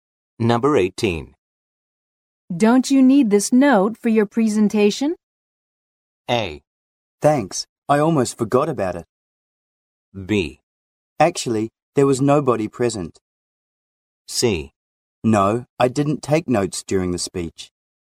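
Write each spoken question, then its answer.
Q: Don't you need this note for your presentation?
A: A: Thanks, I almost forgot about it.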